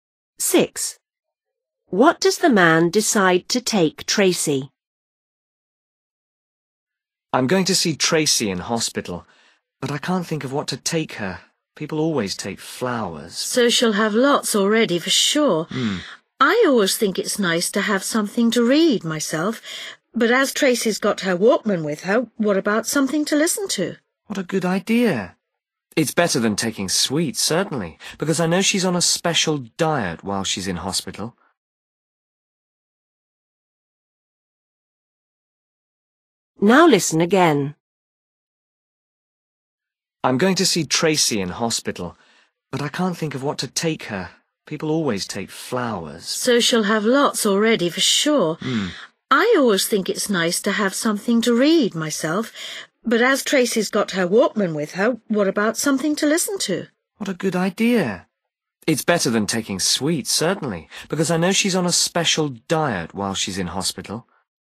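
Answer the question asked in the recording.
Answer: Something to listen to on her Walkman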